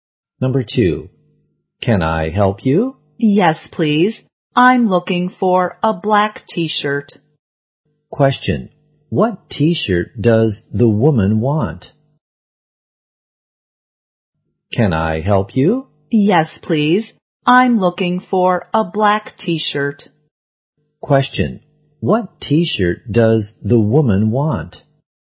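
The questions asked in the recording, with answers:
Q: what t-shirt does the woman want?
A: A black t-shirt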